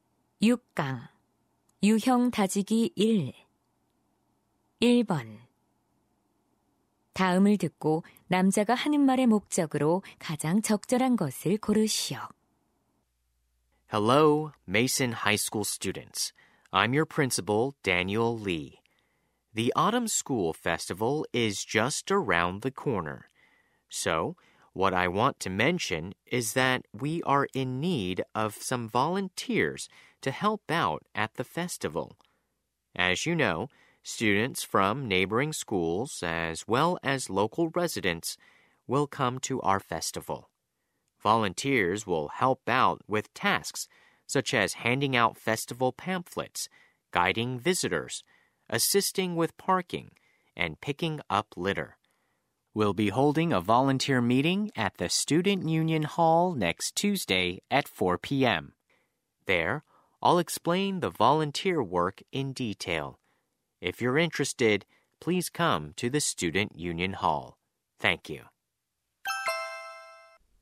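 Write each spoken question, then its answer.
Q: 다음을 듣고 남자가 하는 말의 목적으로 가장 적절한 것을 고르시오.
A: 학교 축제 자원봉사자를 모집하려고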